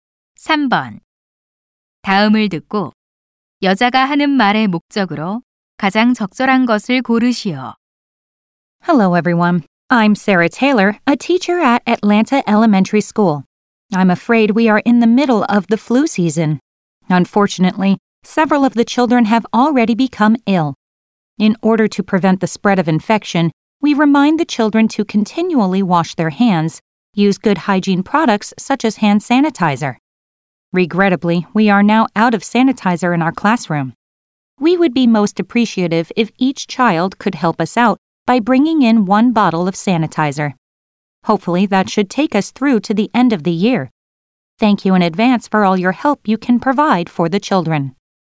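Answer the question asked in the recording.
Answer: 각 학생에게 손 세정제를 한 병씩 가져와 달라고 요청하려고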